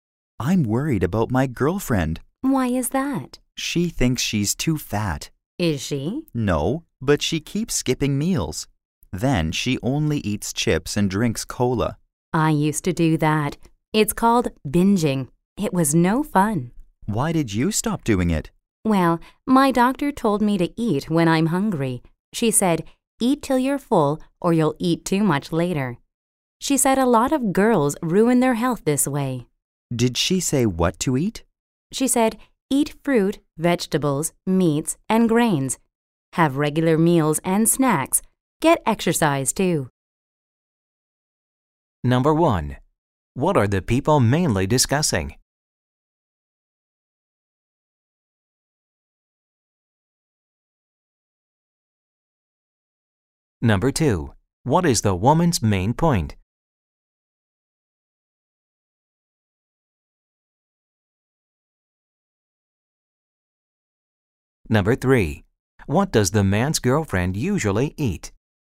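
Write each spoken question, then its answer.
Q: What are the people mainly discussing?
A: The man's girlfriend's unhealthy eating habits (skipping meals and binging)

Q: What does the man's girlfriend usually eat?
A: Chips and cola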